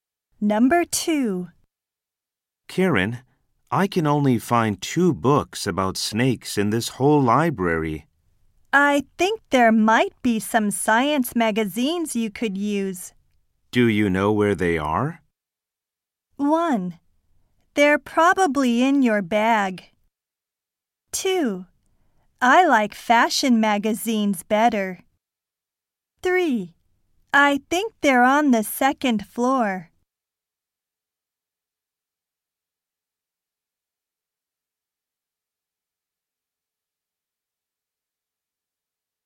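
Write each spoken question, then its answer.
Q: Do you know where they are?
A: 3: I think they're on the second floor.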